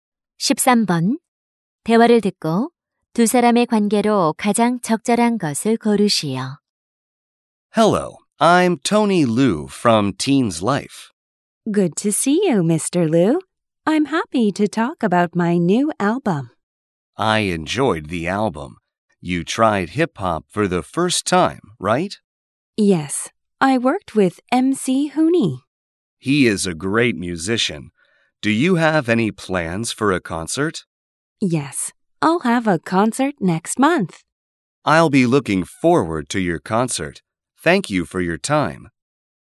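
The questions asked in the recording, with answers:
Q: 대화를 듣고 두 사람의 관계로 가장 적절한 것을 고르시오.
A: 기자 - 가수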